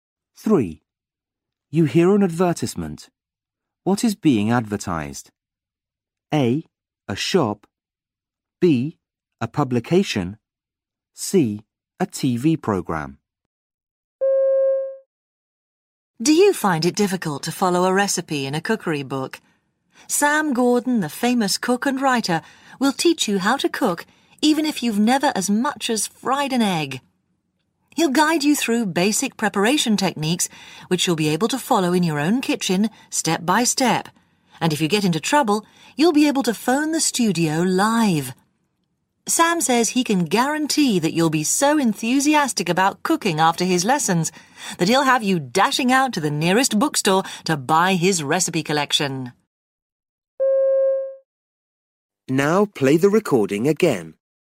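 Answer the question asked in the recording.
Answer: C: A TV program.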